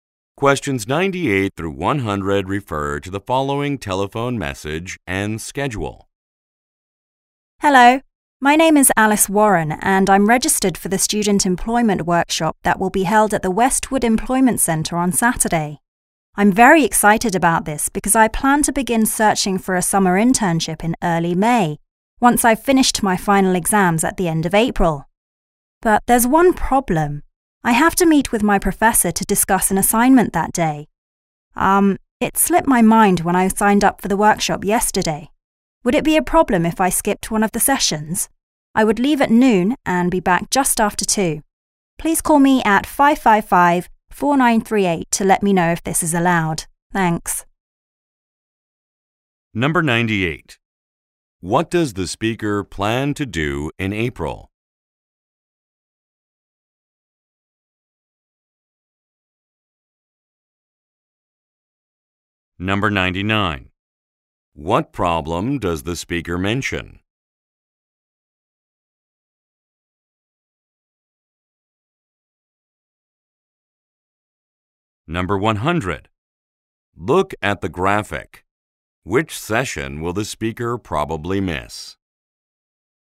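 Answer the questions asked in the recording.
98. Finish her final exams
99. She has to meet her professor on the workshop day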